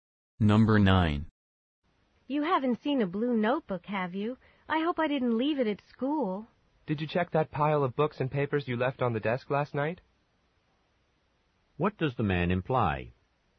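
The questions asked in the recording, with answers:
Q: What does the man imply?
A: The notebook may be in the pile on the desk.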